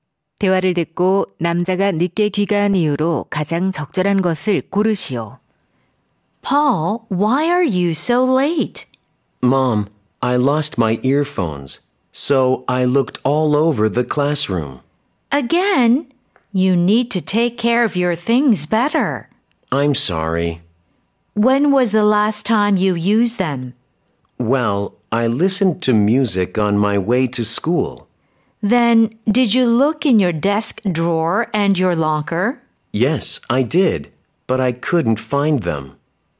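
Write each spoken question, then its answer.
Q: 대화를 듣고 남자가 늦게 귀가한 이유로 가장 적절한 것을 고르시오.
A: 잃어버린 이어폰을 교실에서 찾느라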